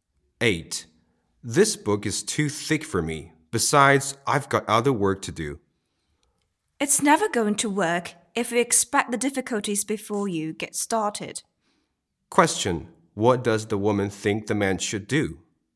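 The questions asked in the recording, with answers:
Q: What does the woman think the man should do?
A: Just get started reading the book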